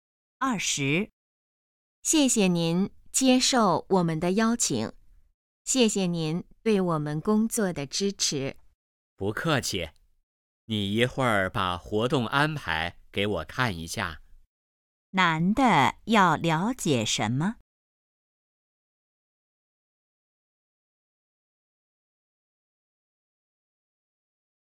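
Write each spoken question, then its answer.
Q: 男的要了解什么?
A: 活动安排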